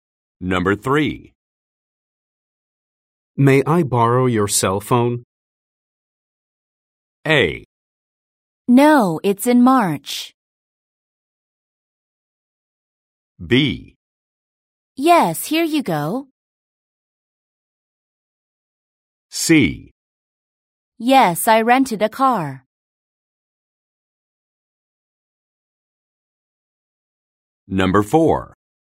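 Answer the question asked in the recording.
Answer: B: Yes, here you go.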